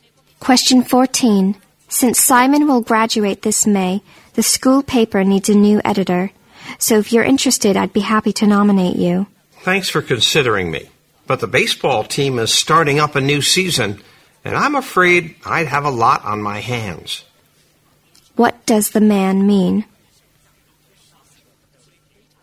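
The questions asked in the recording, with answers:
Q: What does the man mean?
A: He is turning down the editor job because he will be busy with the baseball season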